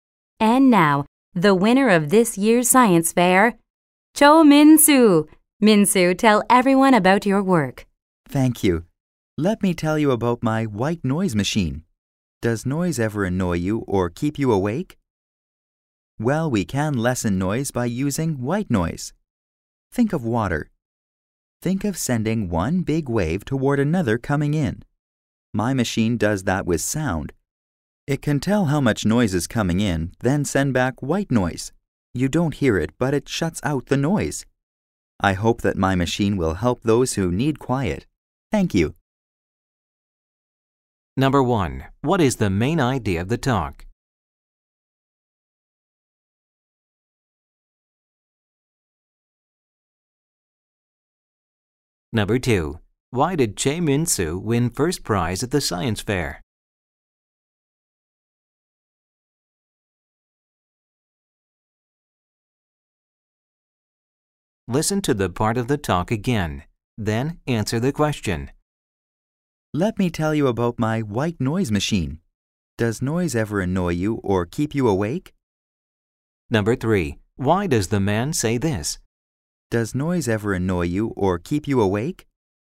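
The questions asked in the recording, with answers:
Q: What is the main idea of the talk?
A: A machine that uses white noise to block out unwanted noise

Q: Why did Cho Min-soo win first prize at the science fair?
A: He invented a white noise machine that blocks out noise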